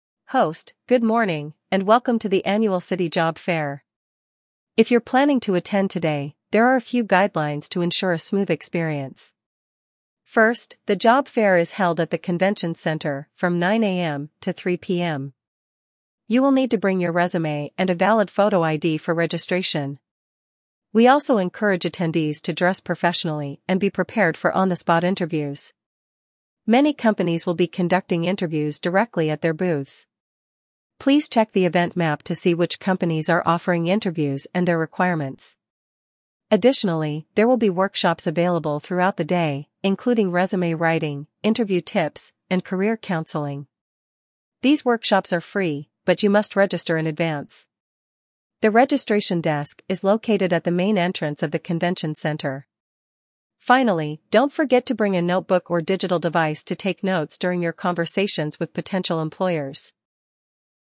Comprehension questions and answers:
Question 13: Where is the job fair taking place?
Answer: Convention Center

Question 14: What two items are required for registration?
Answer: Resume and photo ID

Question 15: What type of attire is recommended?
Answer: Dress professionally

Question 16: What will companies be doing at their booths?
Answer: On-the-spot interviews

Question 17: What workshops are available at the job fair?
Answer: Workshops like resume writing

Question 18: How can you register for the workshops?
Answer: Register at the desk

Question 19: What should attendees bring to take notes?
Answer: Bring a notebook

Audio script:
Host: Good morning, and welcome to the annual City Job Fair. If you're planning to attend today, there are a few guidelines to ensure a smooth experience. First, the job fair is held at the Convention Center from 9 AM to 3 PM. You will need to bring your resume and a valid photo ID for registration.
We also encourage attendees to dress professionally and be prepared for on-the-spot interviews. Many companies will be conducting interviews directly at their booths. Please check the event map to see which companies are offering interviews and their requirements.
Additionally, there will be workshops available throughout the day, including resume writing, interview tips, and career counseling. These workshops are free, but you must register in advance. The registration desk is located at the main entrance of the convention center.
Finally, don't forget to bring a notebook or digital device to take notes during your conversations with potential employers.